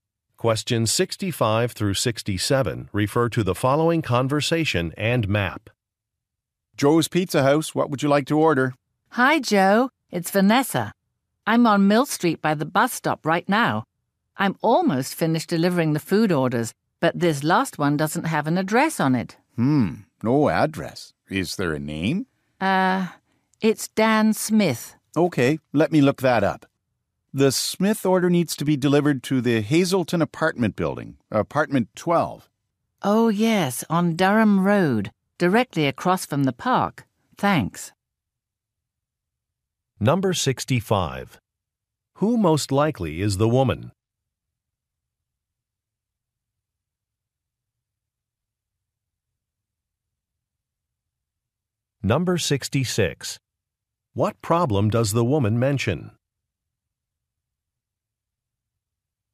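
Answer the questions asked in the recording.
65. A delivery driver
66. An order has no address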